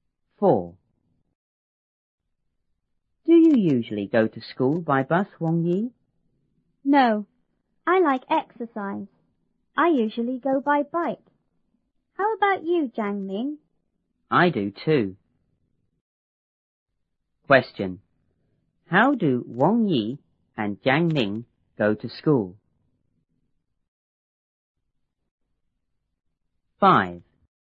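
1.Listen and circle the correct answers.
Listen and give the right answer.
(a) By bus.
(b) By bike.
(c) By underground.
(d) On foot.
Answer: (b) By bike.

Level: 初中英语广州版1B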